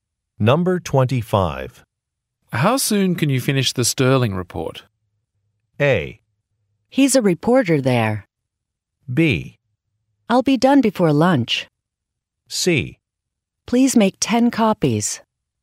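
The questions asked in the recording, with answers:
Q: How soon can you finish the Sterling report?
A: B: I'll be done before lunch.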